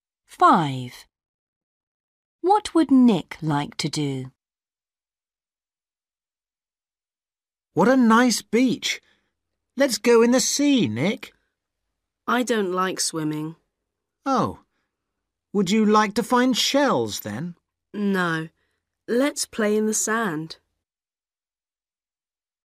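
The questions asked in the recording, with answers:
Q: What would Nick like to do?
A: play in the sand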